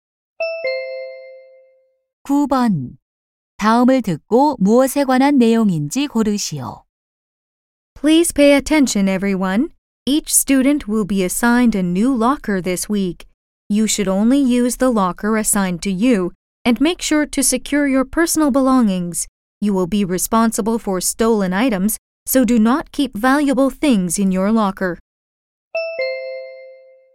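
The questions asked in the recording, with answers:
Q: 다음을 듣고 무엇에 관한 내용인지 고르시오.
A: 새 사물함 배정 및 사용 안내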